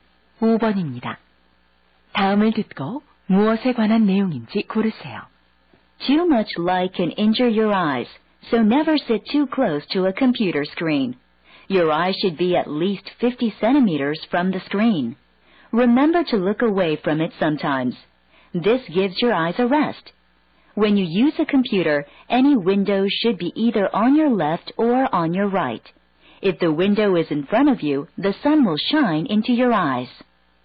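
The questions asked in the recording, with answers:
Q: 다음을 듣고 무엇에 관한 내용인지 고르세요.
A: 컴퓨터 사용 시 눈 보호 방법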